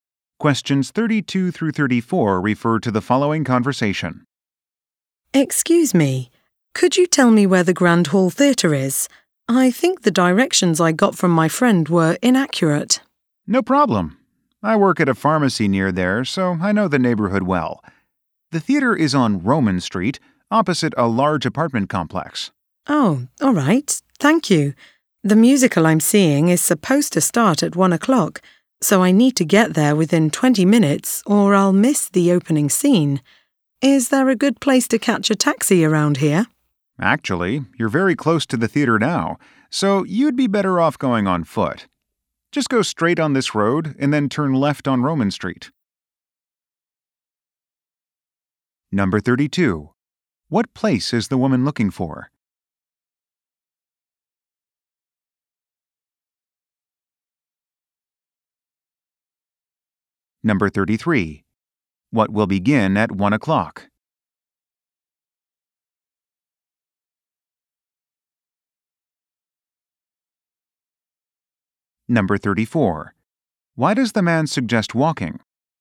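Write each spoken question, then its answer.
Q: What place is the woman looking for?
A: The Grand Hall Theatre

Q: What will begin at 1 o'clock?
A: A musical

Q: Why does the man suggest walking?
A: The theater is very close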